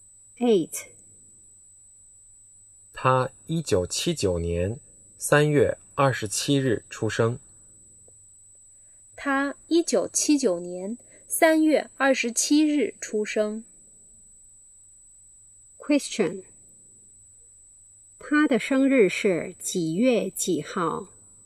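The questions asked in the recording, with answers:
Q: 他的生日是几月几号?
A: 3月27号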